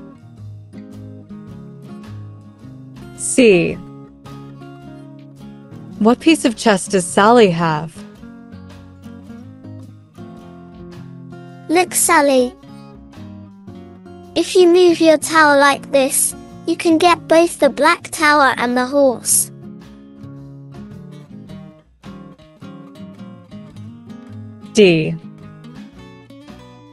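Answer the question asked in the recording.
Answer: A tower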